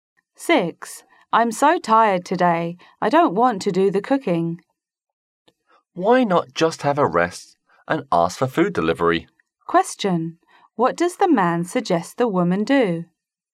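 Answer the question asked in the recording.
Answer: Have a rest and order food delivery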